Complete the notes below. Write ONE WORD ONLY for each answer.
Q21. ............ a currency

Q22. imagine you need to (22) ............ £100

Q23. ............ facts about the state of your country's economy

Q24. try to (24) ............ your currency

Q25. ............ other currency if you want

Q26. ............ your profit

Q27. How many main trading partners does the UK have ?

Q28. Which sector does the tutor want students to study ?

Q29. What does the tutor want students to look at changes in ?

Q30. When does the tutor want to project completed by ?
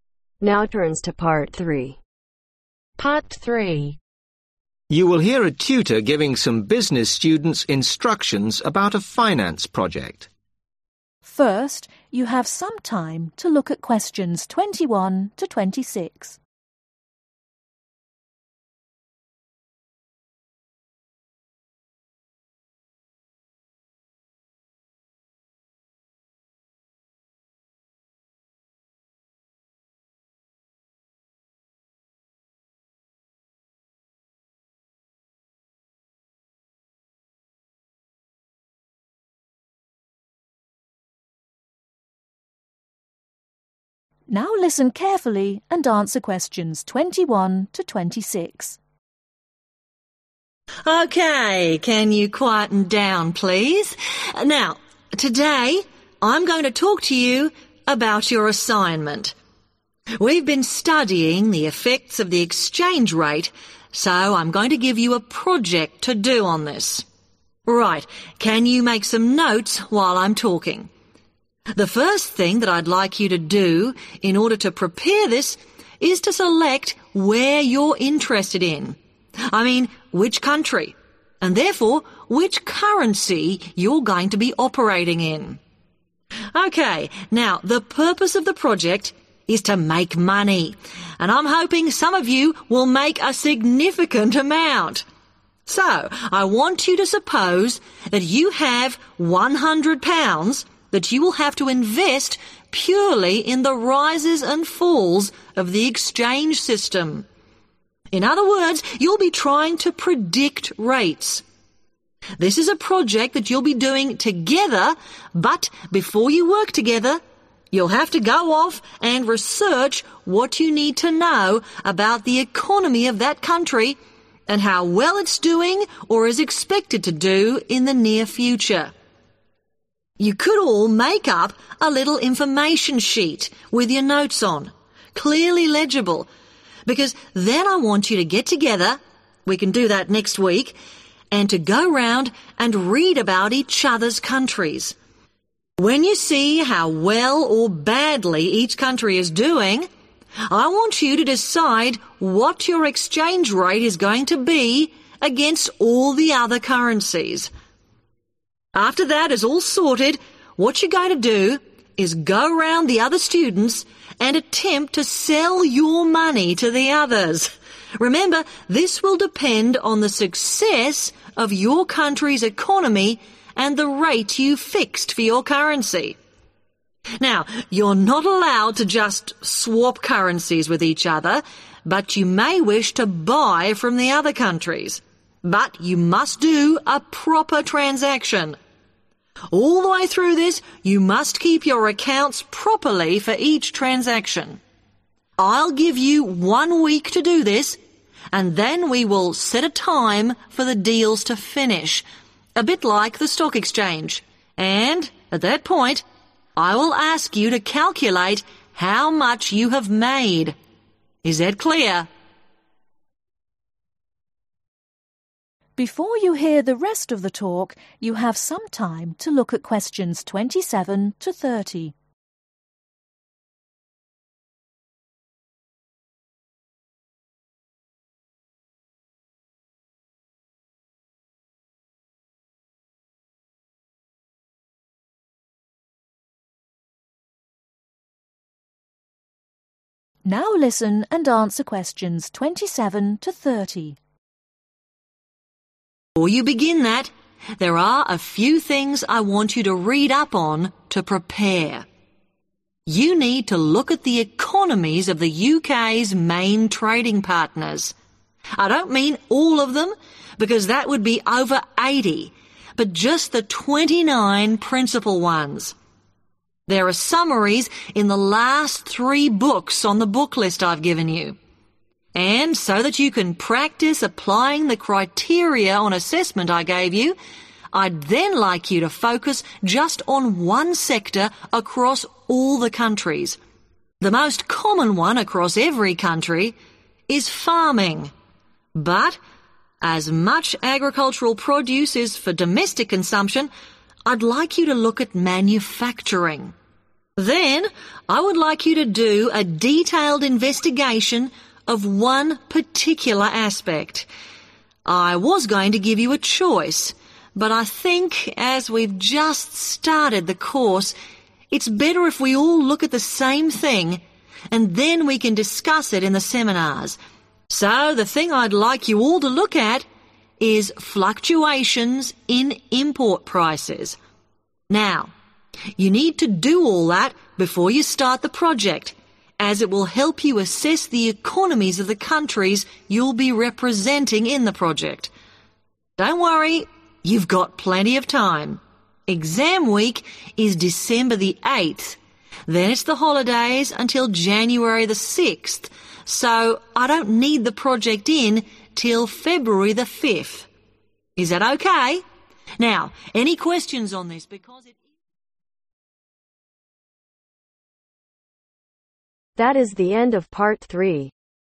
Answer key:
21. Select
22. invest
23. research
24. sell
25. buy
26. calculate
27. 29
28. manufacturing
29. import prices
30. February 5th